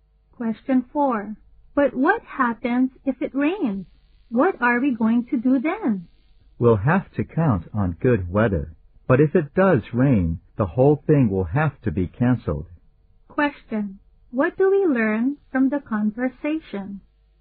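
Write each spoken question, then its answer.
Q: What do we learn from the conversation?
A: The event will be canceled if it rains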